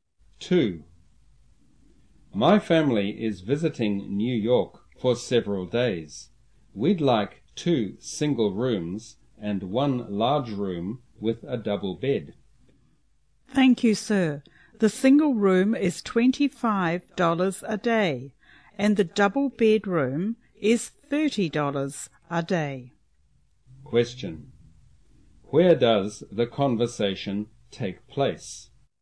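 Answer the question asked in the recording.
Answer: In a hotel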